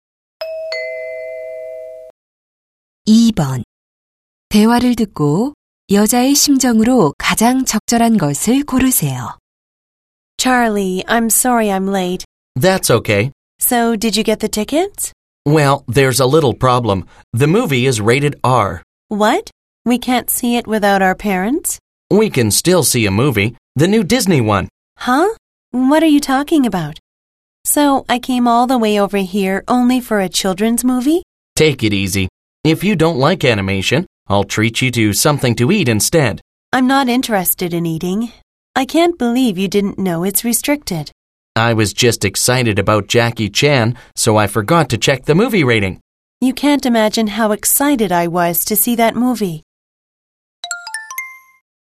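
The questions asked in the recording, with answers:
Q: 대화를 듣고 여자의 심정으로 가장 적절한 것을 고르세요.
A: 실망하고 짜증남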